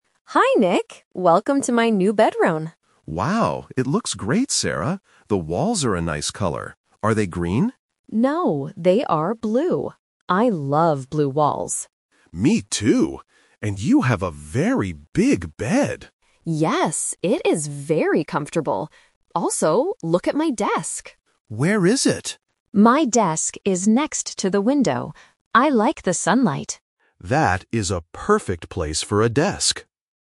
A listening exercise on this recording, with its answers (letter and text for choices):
Listen to the conversation and choose the correct answer (A, B, or C).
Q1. What color are the walls in Sarah's room?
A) Green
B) Blue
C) Yellow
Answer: B) Blue

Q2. What is the bed like?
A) It is small.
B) It is next to the window.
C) It is big.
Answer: C) It is big.

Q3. Where is the desk?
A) Next to the bed.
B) Next to the window.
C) Under the bed.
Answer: B) Next to the window.

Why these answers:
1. Sarah explicitly says "No, they are blue". Option (A) is a trap because Nick asks if they are green, but Sarah denies it.
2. Nick says, "You have a very big bed!" and Sarah agrees. Option (B) is a trap because it uses the location of the desk to confuse the listener.
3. Sarah says clearly, "My desk is next to the window." Option (A) is a common distractor in A1 by mixing up furniture names (bed vs. desk).

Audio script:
Sarah: Hi, Nick! Welcome to my new bedroom.
Nick: Wow, it looks great, Sarah! The walls are a nice color. Are they green?
Sarah: No, they are blue. I love blue walls.
Nick: Me too. And you have a very big bed!
Sarah: Yes, it is very comfortable. Also, look at my desk.
Nick: Where is it?
Sarah: My desk is next to the window. I like the sunlight.
Nick: That is a perfect place for a desk.

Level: A1